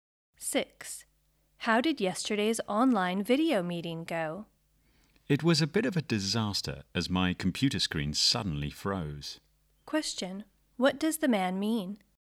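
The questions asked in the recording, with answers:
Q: What does the man mean?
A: The meeting went badly because his screen froze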